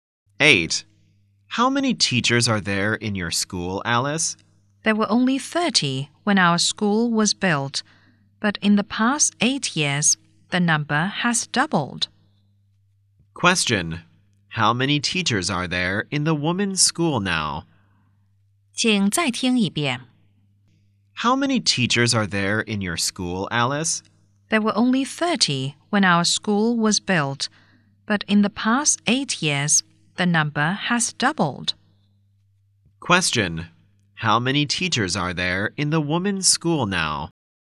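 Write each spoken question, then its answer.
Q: How many teachers are there in the women's school now?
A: 60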